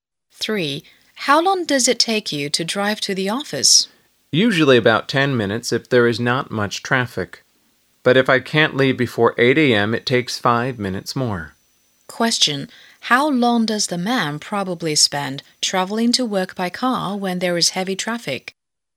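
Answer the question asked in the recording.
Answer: About 15 minutes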